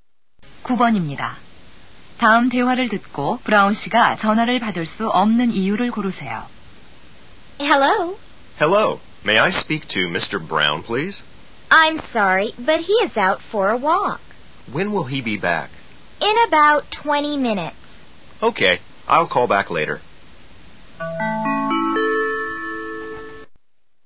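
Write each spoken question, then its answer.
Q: 다음 대화를 듣고 브라운 씨가 전화를 받을 수 없는 이유를 고르세요.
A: 산책하러 나가서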